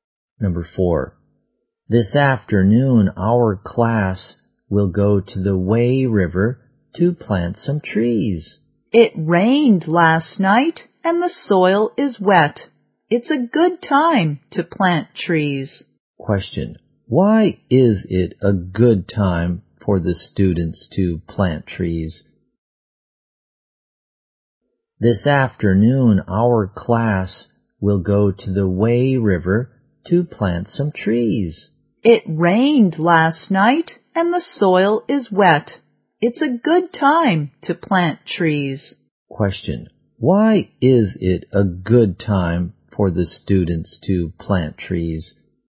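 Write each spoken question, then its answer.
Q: Why is it a good time for the students to plant trees?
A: It rained last night and the soil is wet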